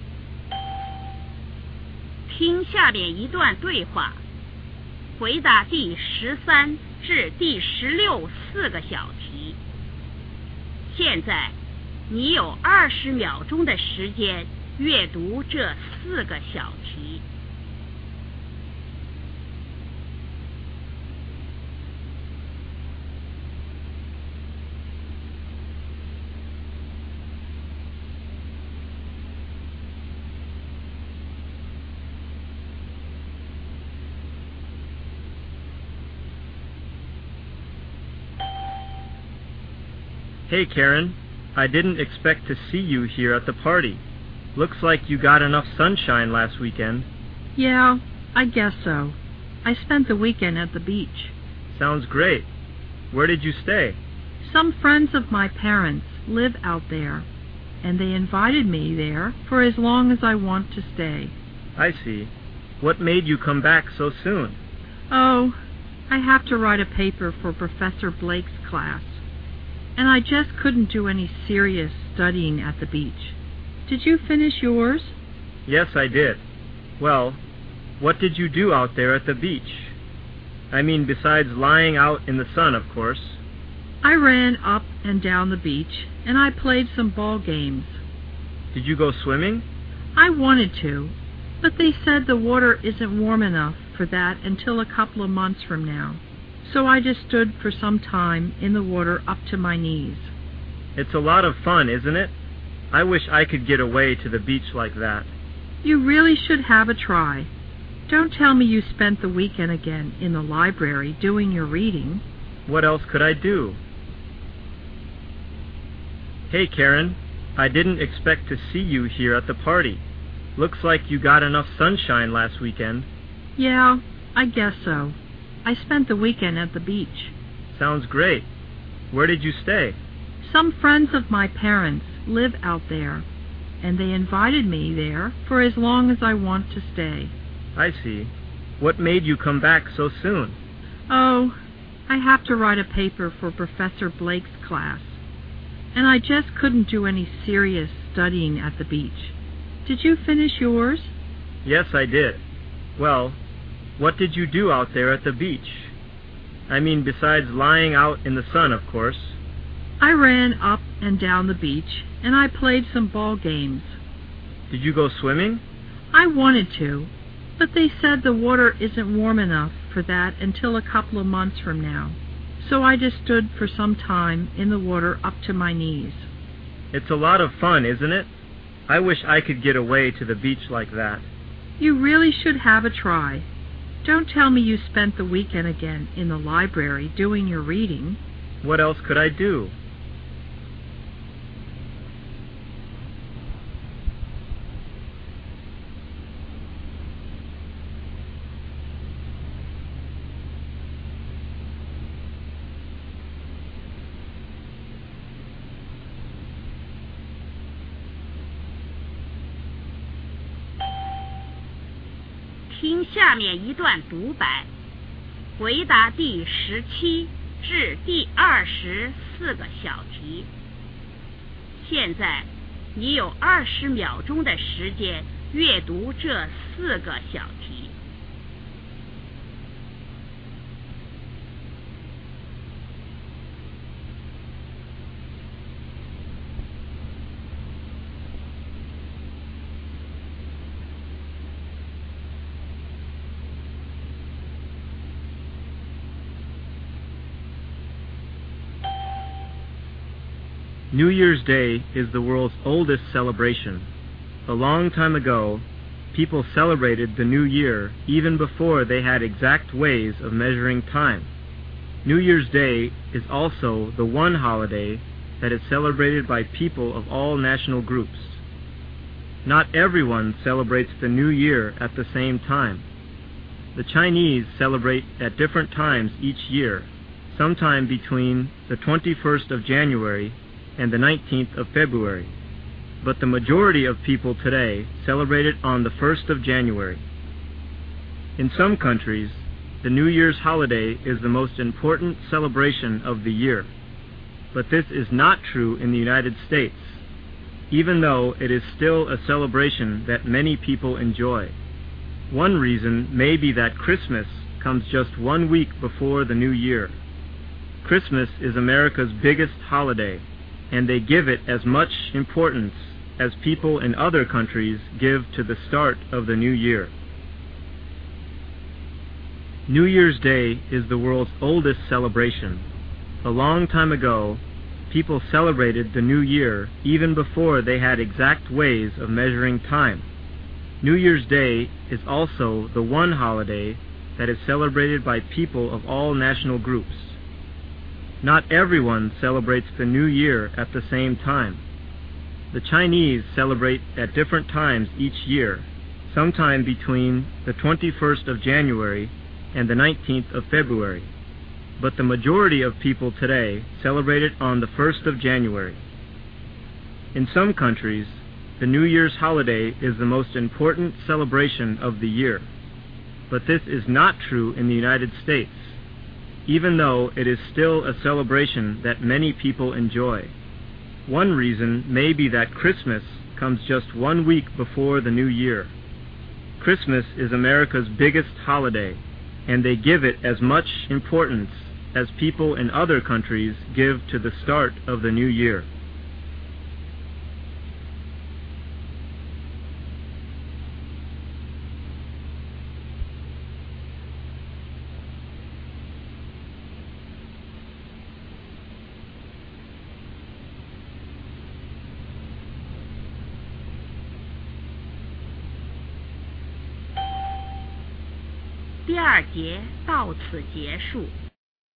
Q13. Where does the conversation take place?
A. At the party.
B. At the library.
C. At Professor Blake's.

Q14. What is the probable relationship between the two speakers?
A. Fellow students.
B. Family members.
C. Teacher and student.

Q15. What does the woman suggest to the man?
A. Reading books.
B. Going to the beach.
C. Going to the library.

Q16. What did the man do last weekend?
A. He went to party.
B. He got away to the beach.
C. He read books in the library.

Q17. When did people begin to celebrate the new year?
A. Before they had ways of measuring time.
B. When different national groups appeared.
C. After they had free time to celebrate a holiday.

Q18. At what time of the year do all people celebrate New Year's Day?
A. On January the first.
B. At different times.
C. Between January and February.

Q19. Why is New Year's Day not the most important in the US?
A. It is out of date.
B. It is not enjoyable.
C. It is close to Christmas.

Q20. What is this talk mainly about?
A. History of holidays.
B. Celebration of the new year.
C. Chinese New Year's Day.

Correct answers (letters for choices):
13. A
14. A
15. B
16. C
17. A
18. B
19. C
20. B